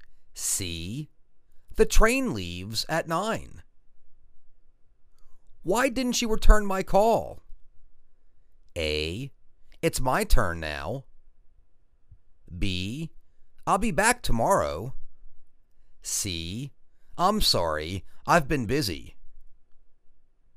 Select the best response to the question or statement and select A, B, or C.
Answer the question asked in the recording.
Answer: I'm sorry. I've been busy.